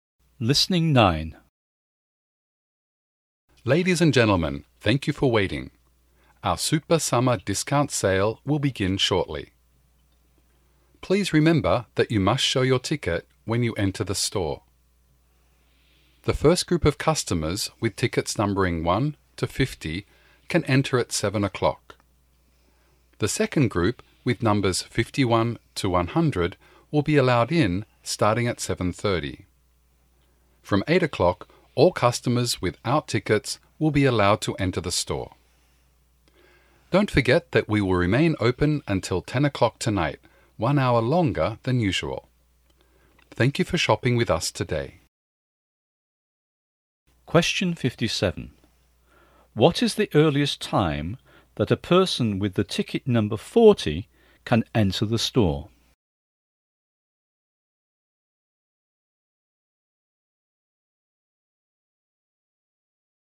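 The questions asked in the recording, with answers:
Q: What is the earliest time that a person with the ticket number 40 can enter the store.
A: 7 o'clock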